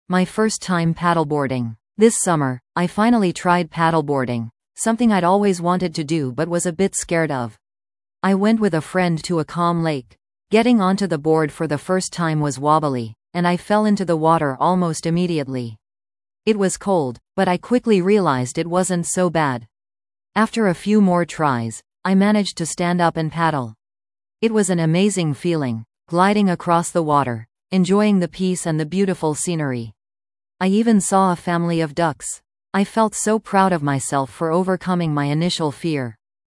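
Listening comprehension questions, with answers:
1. What new activity did the speaker try this summer?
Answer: Paddleboarding

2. What happened when the speaker first got on the board?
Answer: It was wobbly and they fell into the water almost immediately

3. How did the speaker feel after managing to paddle?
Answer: Amazing and proud of themselves

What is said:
My First Time Paddleboarding
This summer, I finally tried paddleboarding, something I'd always wanted to do but was a bit scared of. I went with a friend to a calm lake. Getting onto the board for the first time was wobbly, and I fell into the water almost immediately! It was cold, but I quickly realized it wasn't so bad. After a few more tries, I managed to stand up and paddle. It was an amazing feeling, gliding across the water, enjoying the peace and the beautiful scenery. I even saw a family of ducks! I felt so proud of myself for overcoming my initial fear.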